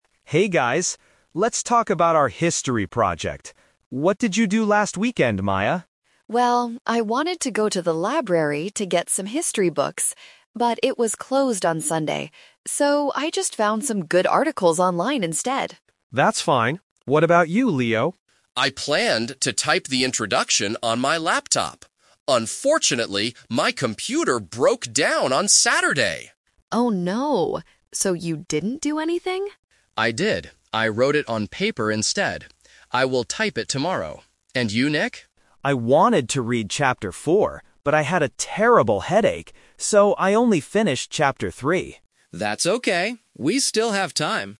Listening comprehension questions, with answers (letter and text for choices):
Listen to three students talking about their group project. Then, circle the correct answer for each question.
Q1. What did Maya find for the project?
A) Some history books.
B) Some online articles.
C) A documentary video.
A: B) Some online articles.

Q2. How did Leo write the introduction?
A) On his laptop.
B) On his smartphone.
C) On paper.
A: C) On paper.

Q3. What did Nick read over the weekend?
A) Only chapter three.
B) Chapter four.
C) The whole book.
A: A) Only chapter three.

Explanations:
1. Maya says, "So, I just found some good articles online instead." Option (A) is the trap; she wanted to get history books, but the library was closed. Option (C) is not mentioned in the audio.
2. Leo states clearly, "I wrote it on paper instead." Option (A) is the trap (The Twist); he planned to use his laptop, but it broke down. Option (B) is a plausible tool for students, but it is never mentioned.
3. Nick says, "So, I only finished chapter three." Option (B) is the trap; he wanted to read chapter four, but couldn't because of a headache. Option (C) is never mentioned.

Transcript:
Nick: Hey guys. Let's talk about our history project. What did you do last weekend, Maya?
Maya: Well, I wanted to go to the library to get some history books. But it was closed on Sunday. So, I just found some good articles online instead.
Nick: That's fine. What about you, Leo?
Leo: I planned to type the introduction on my laptop. Unfortunately, my computer broke down on Saturday!
Maya: Oh no! So you didn't do anything?
Leo: I did. I wrote it on paper instead. I will type it tomorrow. And you, Nick?
Nick: I wanted to read chapter four, but I had a terrible headache. So, I only finished chapter three.